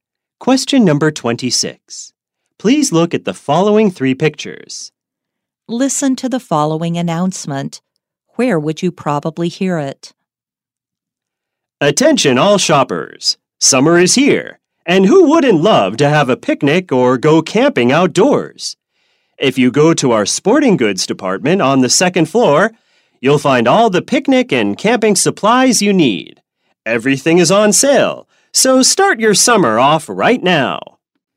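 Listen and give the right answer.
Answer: In a department store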